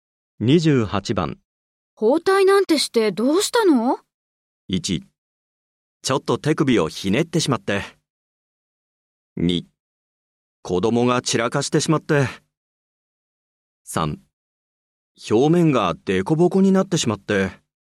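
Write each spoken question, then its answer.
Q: 包帯なんてしてどうしたの?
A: 1: ちょっと手首をひねってしまって。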